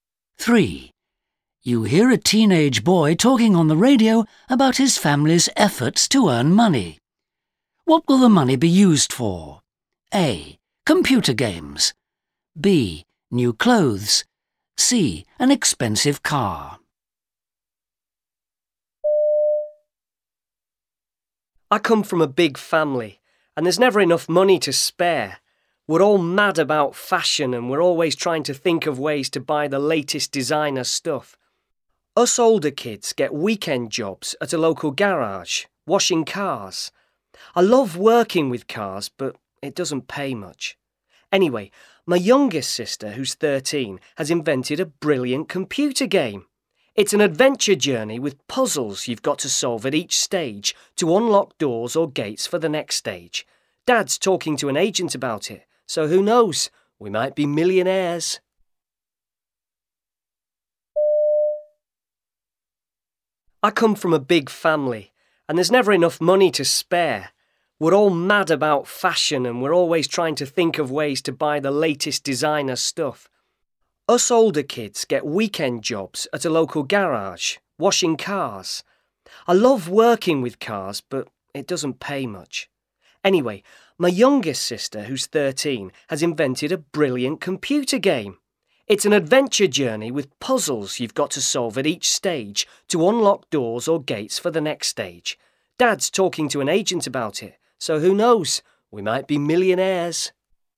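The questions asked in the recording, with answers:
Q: What will the money be used for?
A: B: New clothes.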